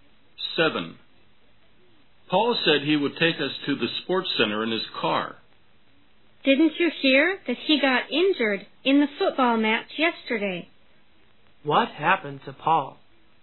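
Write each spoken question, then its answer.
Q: What happened to Paul?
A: He got injured in the football match yesterday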